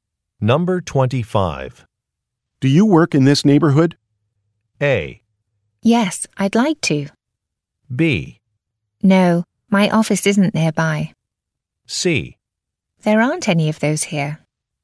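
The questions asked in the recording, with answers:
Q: Do you work in this neighborhood?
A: B: No, my office isn't nearby.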